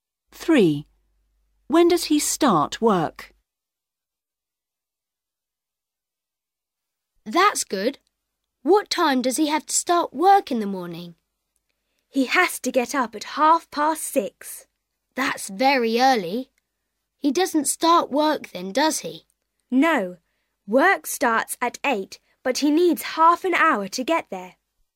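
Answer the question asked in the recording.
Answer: At 8 o'clock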